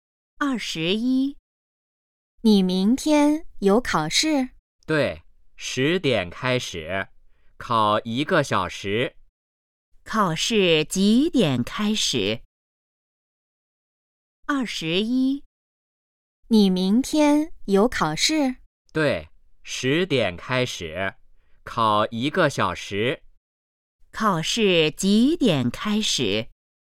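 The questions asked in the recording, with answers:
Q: 考试几点开始?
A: 十点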